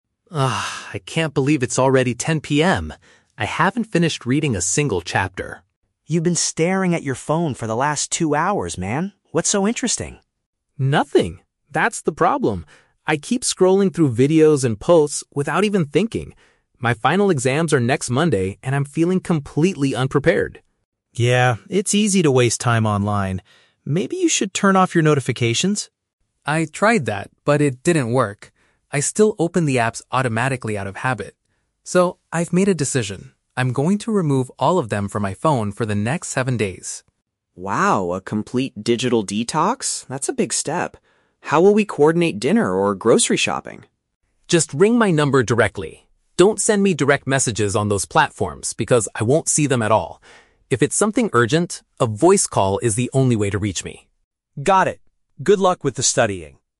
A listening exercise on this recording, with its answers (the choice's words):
Listen to a conversation between two roommates. For each question, choose the correct answer (A, B, or C).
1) Why is Leo frustrated at the beginning of the conversation?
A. He cannot find the textbook he needs to read.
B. He has wasted too much time looking at his screen.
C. He got a bad grade on his exam last Monday.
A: He has wasted too much time looking at his screen.

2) What is Leo's plan to solve his lack of focus?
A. He will silence the alerts on his device.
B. He will completely turn off his smartphone.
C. He will uninstall specific programs for a week.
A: He will uninstall specific programs for a week.

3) How should Sam contact Leo if they need to discuss buying food?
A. By sending him a text message online.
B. By speaking to him over the phone.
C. By leaving a note on the dinner table.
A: By speaking to him over the phone.

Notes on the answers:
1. Sam notices that Leo has been "staring at your phone for the last two hours", which means looking at his screen. Leo agrees this is the problem. Option (C) is a trap; the audio mentions "exams" and "Monday", but the exams are next Monday, so he hasn't failed them yet. Option (A) is not mentioned.
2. Leo says he is going to "remove all of them [the apps] from my phone for the next seven days", which means uninstalling programs for a week. Option (A) is a trap; Sam suggests turning off notifications (silencing alerts), but Leo says he already tried that and it "didn't work". Option (B) is incorrect because he will still use his phone for calls.
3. Leo tells Sam to "ring my number directly" and that a "voice call" is the only way to reach him. Option (A) is a trap; Leo explicitly says "Don't send me direct messages" because he won't see them. Option (C) is a trap; dinner is mentioned as a topic they need to coordinate, but leaving a note is not mentioned.

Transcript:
Leo: Ugh, I can't believe it's already 10 PM. I haven't finished reading a single chapter.
Sam: You've been staring at your phone for the last two hours, man. What's so interesting?
Leo: Nothing! That's the problem. I keep scrolling through videos and posts without even thinking. My final exams are next Monday, and I'm feeling completely unprepared.
Sam: Yeah, it's easy to waste time online. Maybe you should turn off your notifications?
Leo: I tried that, but it didn't work. I still open the apps automatically out of habit. So, I've made a decision. I'm going to remove all of them from my phone for the next seven days.
Sam: Wow, a complete digital detox? That's a big step. How will we coordinate dinner or grocery shopping?
Leo: Just ring my number directly. Don't send me direct messages on those platforms because I won't see them at all. If it's something urgent, a voice call is the only way to reach me.
Sam: Got it. Good luck with the studying!